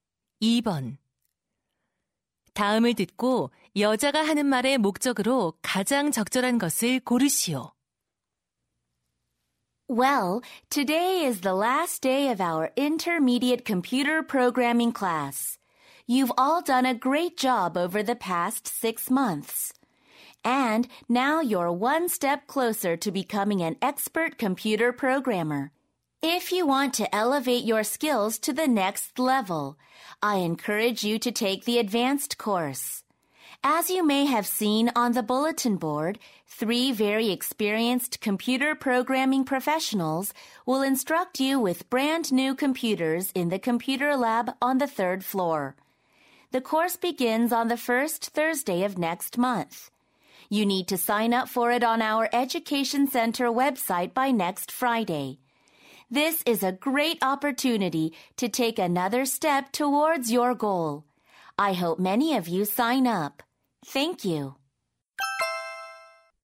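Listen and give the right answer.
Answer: 고급 컴퓨터 프로그래밍 과정 수강을 권장하려고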